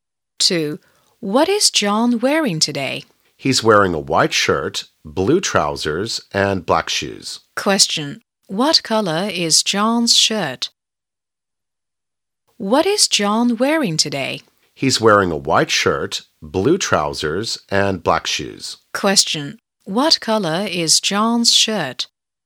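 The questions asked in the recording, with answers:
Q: What color is John's shirt?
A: White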